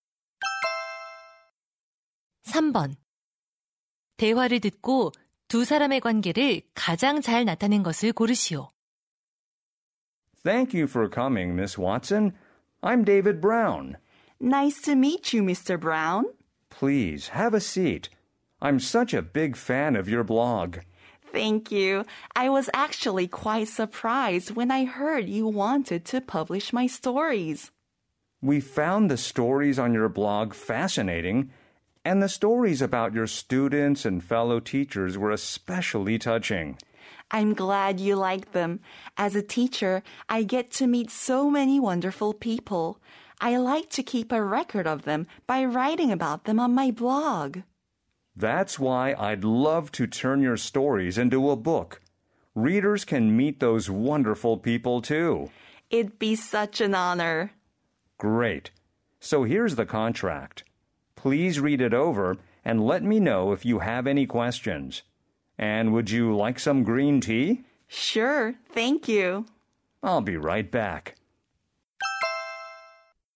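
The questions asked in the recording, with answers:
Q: 대화를 듣고 두 사람의 관계를 가장 잘 나타낸 것을 고르시오.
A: 출판사 편집자 - 블로그 작가(교사)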